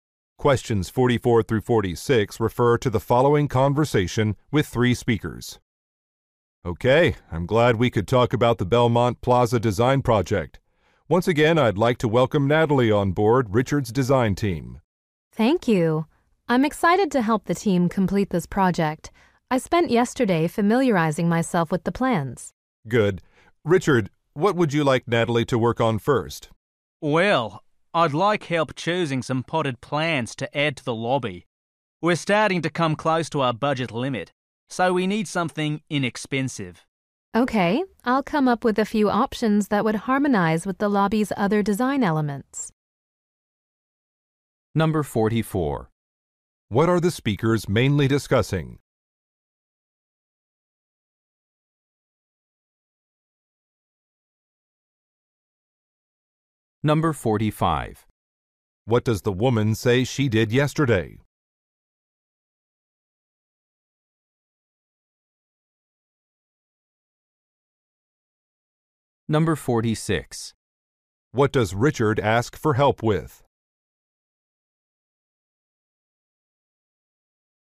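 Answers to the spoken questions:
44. The Belmont Plaza design project
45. Studied the project plans
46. Choosing potted plants for the lobby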